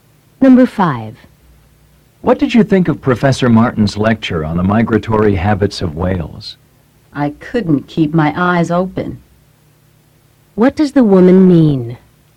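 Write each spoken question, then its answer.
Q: What does the woman mean?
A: The lecture was boring; she almost fell asleep.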